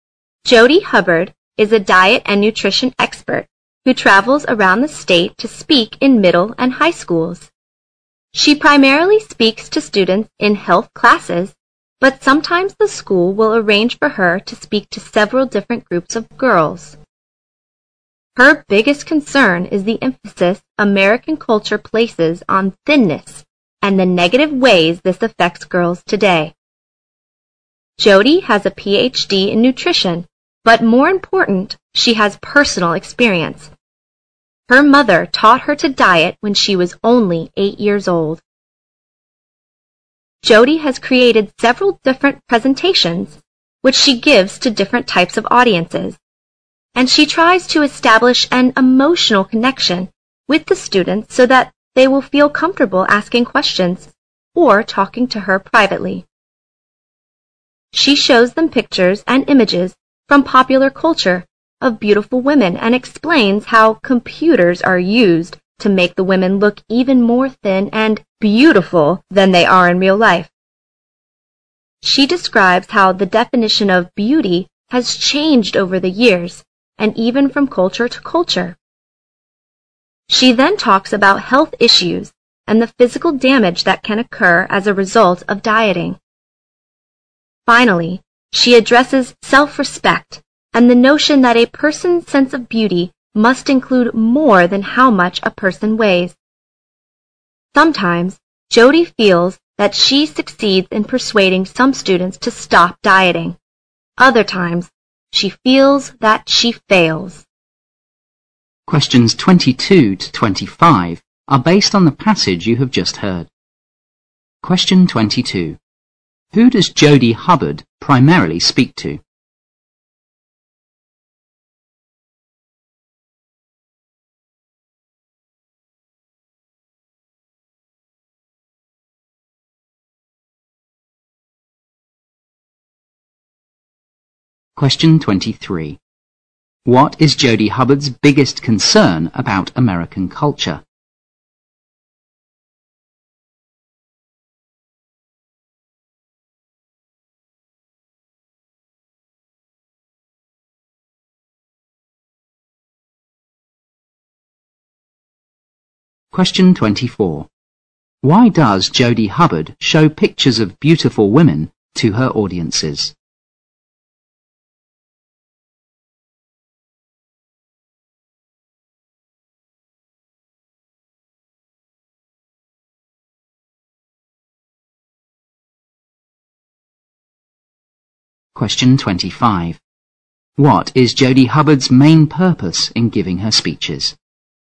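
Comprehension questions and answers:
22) Who does Jody Hubbard primarily speak to?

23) What is Jody Hubbard's biggest concern about American culture?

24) Why does Jody Hubbard show pictures of beautiful women to her audiences?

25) What is Jody Hubbard's main purpose in giving her speeches?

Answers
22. Students in health classes
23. Its emphasis on thinness and the negative effect on girls
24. To explain how computers make women look thinner and more beautiful than in real life
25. To persuade students to stop dieting

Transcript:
Jody Hubbard is a diet and nutrition expert who travels around the state to speak in middle and high schools. She primarily speaks to students in health classes, but sometimes the school will arrange for her to speak to several different groups of girls. Her biggest concern is the emphasis American culture places on thinness and the negative way that affects girls today. 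Jody has a Ph.D. in nutrition, but, more important, she has personal experience. Her mother taught her to diet when she was only 8 years old. Jody has created several different presentations, which she gives to different types of audiences and she tries to establish an emotional connection with the students so that they will feel comfortable asking questions or talking to her privately. She shows them pictures and images from popular culture of beautiful women and explains how computers are used to make the women look even more thin and "beautiful" than they are in real life. She describes how the definition of beauty has changed over the years and even from culture to culture. She then talks about health issues and the physical damage that can occur as a result of dieting. Finally, she addresses self-respect and the notion that a person's sense of beauty must include more than how much a person weighs. 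Sometimes Jody feels that she succeeds in persuading some students to stop dieting; other times she feels that she fails.
Questions 22 to 25 are based on the passage you have just heard.
Question 22. Who does Jody Hubbard primarily speak to?
Question 23. What is Jody Hubbard's biggest concern about American culture?
Question 24.
Question 25. What is Jody Hubbard's main purpose in giving her speeches?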